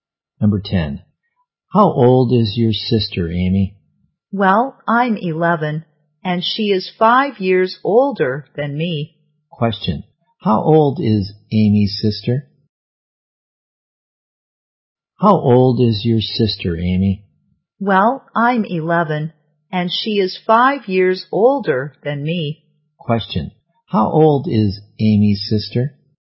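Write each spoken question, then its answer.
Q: Question, how old is Amy's sister?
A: 16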